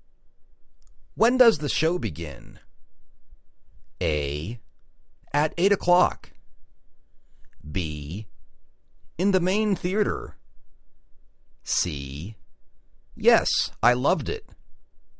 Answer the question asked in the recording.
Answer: At 8 o'clock